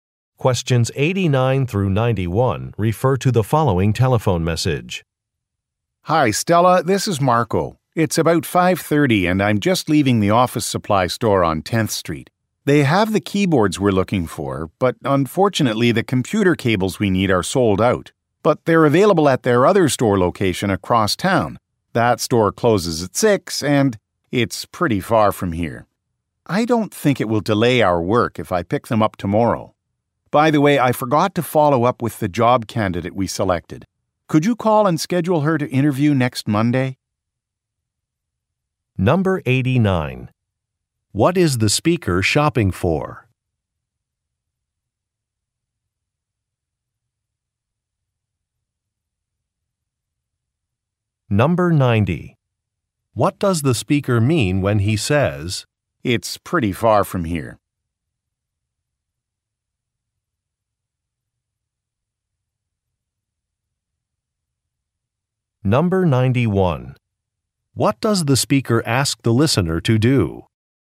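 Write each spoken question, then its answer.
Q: What is the speaker shopping for?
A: Computer equipment (keyboards and computer cables)

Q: What does the speaker mean when he says,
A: He cannot get to the other store before it closes, so he will pick up the cables tomorrow

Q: What does the speaker ask the listener to do?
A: Call the job candidate and schedule an interview for next Monday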